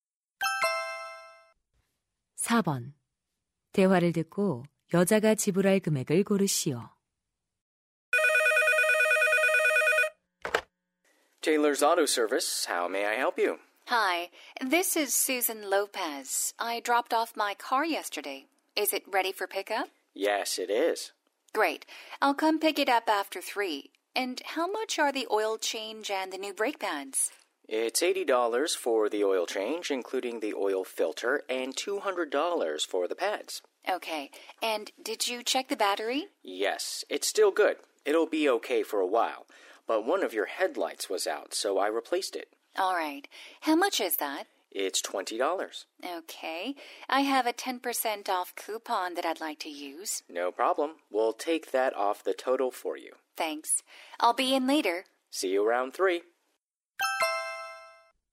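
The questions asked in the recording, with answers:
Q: 대화를 듣고 여자가 지불할 금액을 고르시오.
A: 270달러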